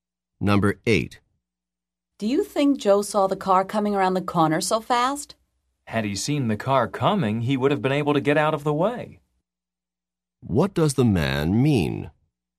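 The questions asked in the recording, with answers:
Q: What does the man mean?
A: Joe didn't see the car and couldn't get out of the way.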